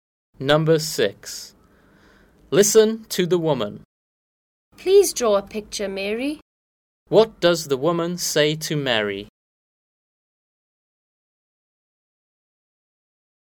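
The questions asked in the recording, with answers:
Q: What does the woman say to Mary?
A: Please draw a picture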